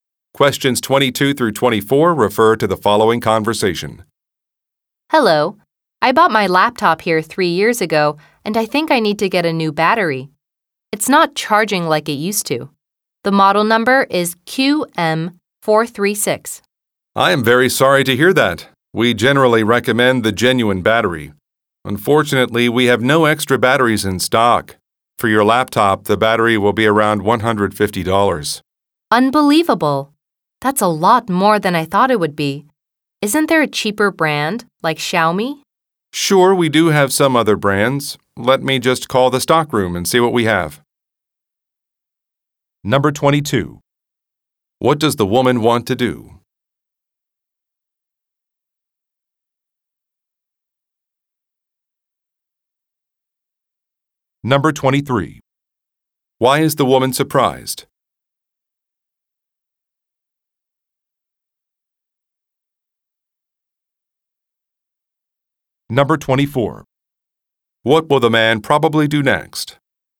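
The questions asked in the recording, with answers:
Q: What does the woman want to do?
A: Get a new laptop battery

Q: Why is the woman surprised?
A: The battery is more expensive than she expected

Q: What will the man probably do next?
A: Call the stockroom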